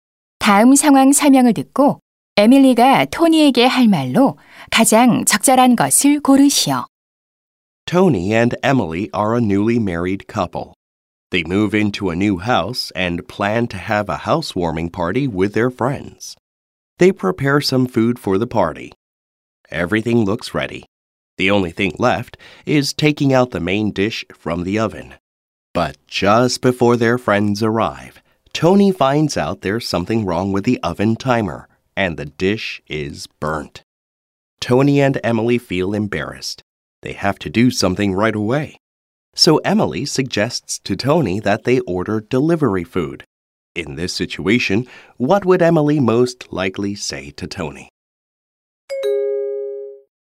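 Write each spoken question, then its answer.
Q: In this situation, what would Emily most likely say to Tony?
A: Why don't we order delivery food?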